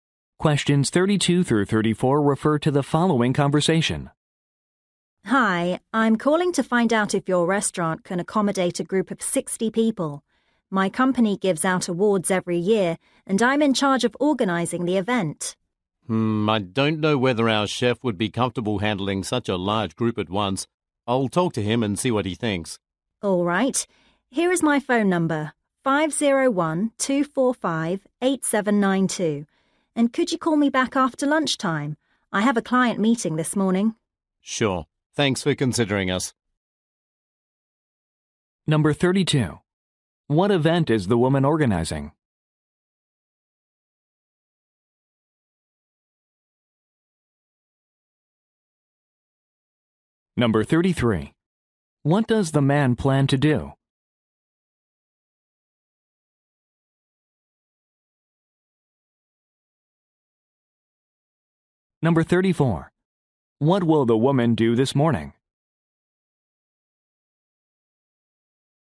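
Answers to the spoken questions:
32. A company awards event
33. Talk to the chef
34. Meet with a client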